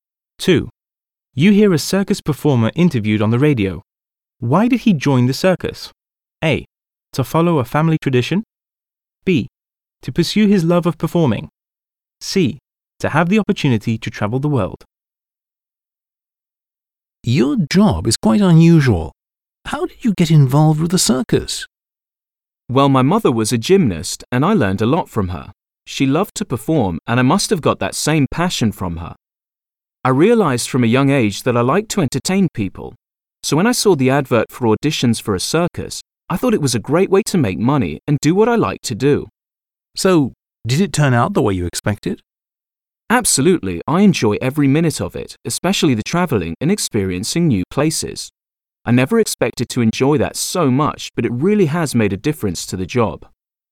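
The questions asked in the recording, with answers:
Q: Why did he join the circus?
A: B: To pursue his love of performing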